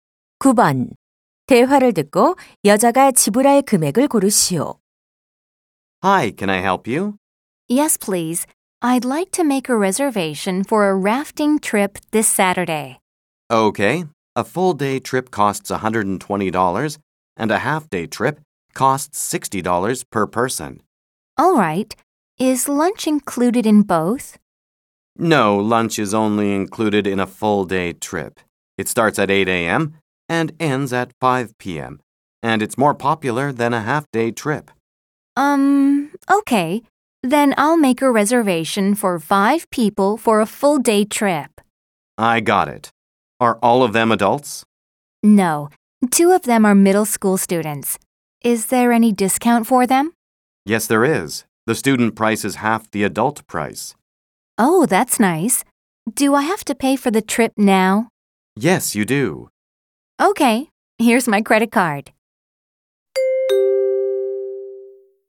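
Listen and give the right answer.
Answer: $480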